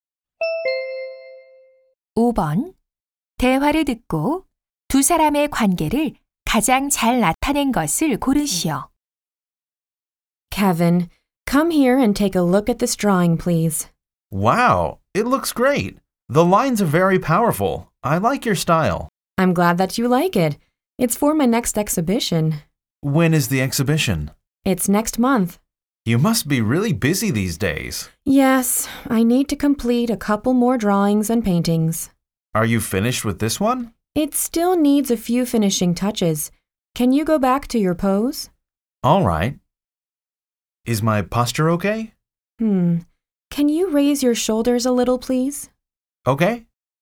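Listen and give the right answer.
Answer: 화가와 모델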